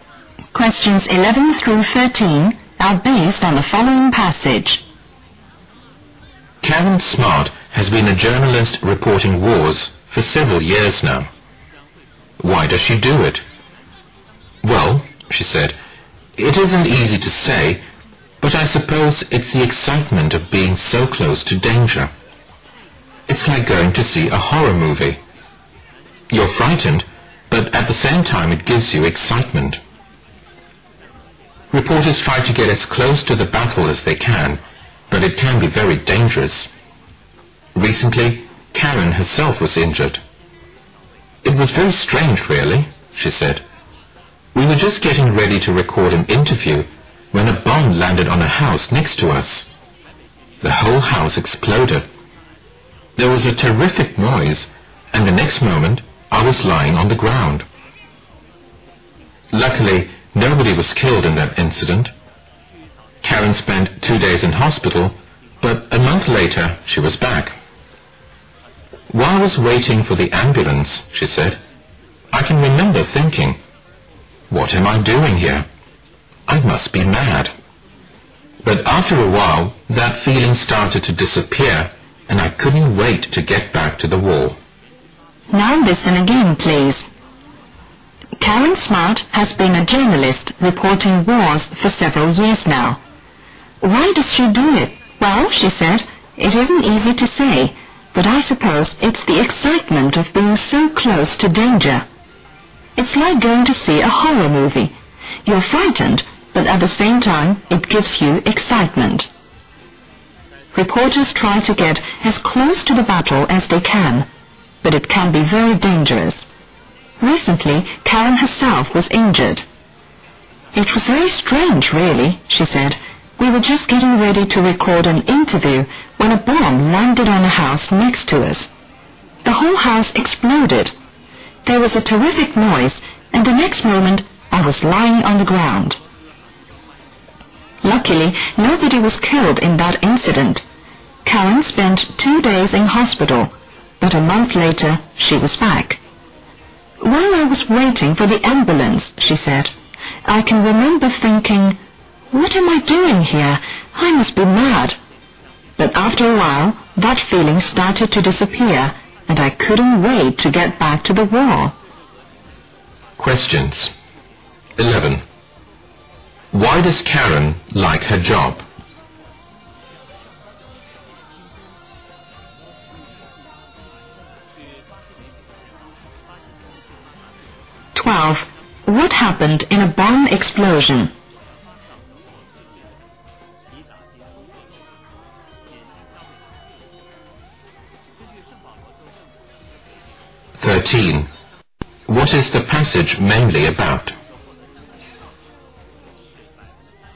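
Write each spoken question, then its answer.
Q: Why does Karen like her job?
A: It is exciting to be close to danger

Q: What happened in a bomb explosion?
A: Karen was injured, but nobody was killed

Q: What is the passage mainly about?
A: A war reporter's experience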